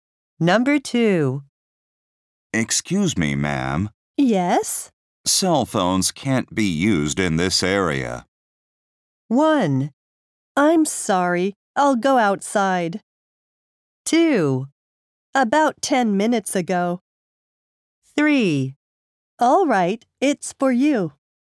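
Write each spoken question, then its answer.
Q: Cell phones can't be used in this area.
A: 1: I'm sorry, I'll go outside.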